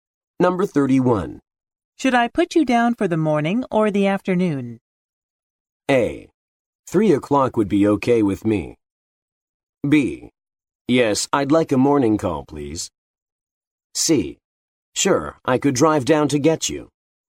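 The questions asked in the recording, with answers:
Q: Should I put you down for the morning or the afternoon?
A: A: 3 o'clock would be okay with me.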